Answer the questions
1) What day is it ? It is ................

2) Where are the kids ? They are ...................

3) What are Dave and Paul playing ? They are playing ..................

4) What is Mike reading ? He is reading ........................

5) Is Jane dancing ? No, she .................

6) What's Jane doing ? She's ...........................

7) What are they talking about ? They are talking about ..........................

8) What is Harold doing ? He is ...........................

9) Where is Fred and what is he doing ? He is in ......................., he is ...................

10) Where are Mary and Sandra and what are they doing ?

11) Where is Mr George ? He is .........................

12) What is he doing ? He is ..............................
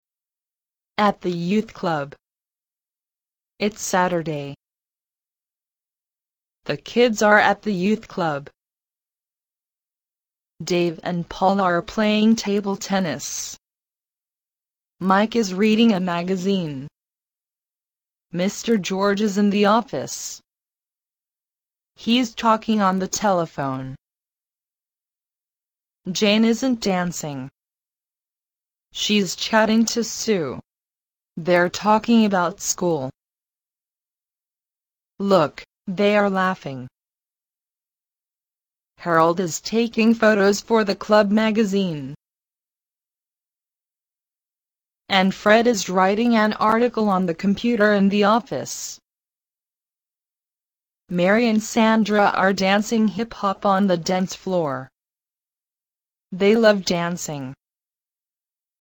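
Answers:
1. Saturday
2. at the youth club
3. table tennis
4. a magazine
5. isn't
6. chatting to Sue
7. school
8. taking photos for the club magazine
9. the office; writing an article on the computer
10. They are dancing hip-hop on the dance floor
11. in the office
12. talking on the telephone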